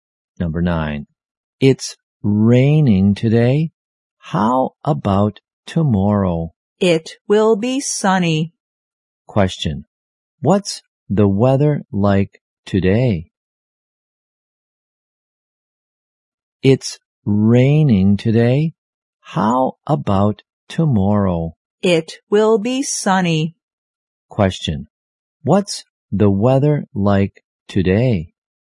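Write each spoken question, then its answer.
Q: Question. What's the weather like today?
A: Rainy.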